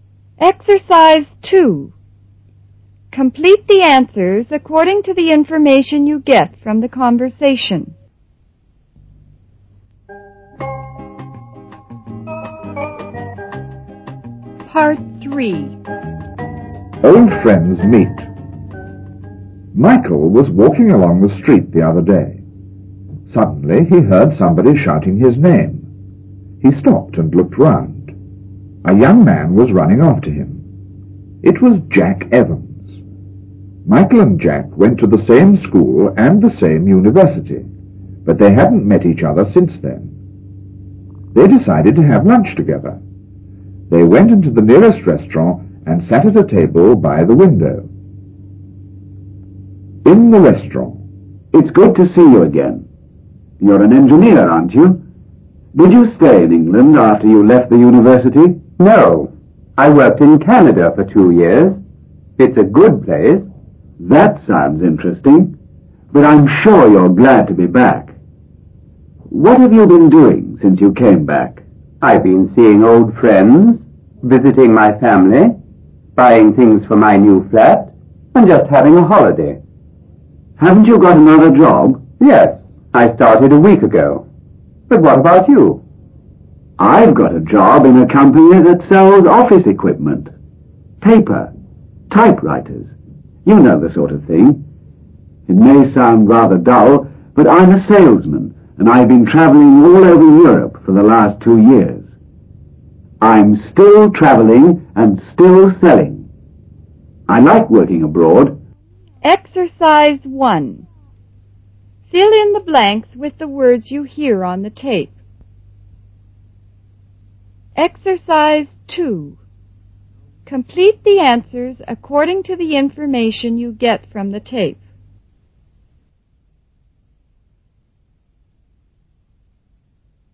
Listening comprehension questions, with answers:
I. Fill in the blanks with the words you hear on the tape,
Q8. Michael was __8__along the street the other day.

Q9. Suddenly he___9__ somebody shouting his name.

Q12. A young man was__12__ after him.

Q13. Michael and Jack__13__ to the same school and the same university.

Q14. But they hadn't __14__each other since then.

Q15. They __15__to have lunch together.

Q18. No, he ___________________18______________________.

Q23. He has been __23__all over Europe for the last two years.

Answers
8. walking
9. heard
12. running
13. went
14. met
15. decided
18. worked in Canada for two years.
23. travelling

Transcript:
Peggy: What do you do there, Ed?
Ed: I do research. It's a very interesting place to work.
Peggy: Oh, I'm sure it is.
Ed: Are you working now, Peggy?
Peggy: I teach Spanish in a high school. I like it very much ... Oh, here's Dick.
Dick: Here we are. This is for you, Ed. And this is for you, Peggy.
III. Old Friends Meet (1'35〃)
Michael was walking along the street the other day. Suddenly he heard somebody shouting his name. He stopped and looked round. A young man was running after him. It was Jack Evans. Michael and Jack went to the same school and the same university. But they hadn't met each other since then. They decided to have lunch together. They went into the nearest restaurant and sat at the table by the window.
(In the restaurant)
Jack: It's good to see you again. You are an engineer, aren't you? Did you stay in England after you left the university?
Michael: No, I worked in Canada for two years. It's a good place.
Jack: That sounds interesting, but I'm sure you are glad to be back. What have you been doing since you came back?
Michael: I've been seeing old friends, visiting my family, buying things for my new flat and just having a holiday.
Jack: Haven't you got another job?
Michael: Yes, I started a week ago. But what about you?
Jack: I've got a job in a company that sells office equipment----paper, typewriters----you know the sort of thing. It may sound rather dull, but I'm a sales-man and I've been travelling all over Europe for the last two years. I'm still travelling and still selling. I like working abroad.